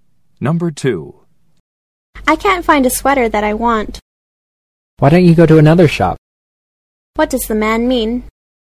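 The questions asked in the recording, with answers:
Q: What does the man mean?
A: She should look in another shop.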